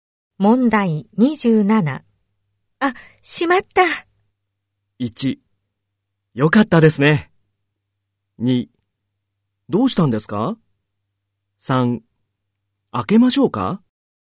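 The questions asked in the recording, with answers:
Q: あ、しまった。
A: 2: どうしたんですか?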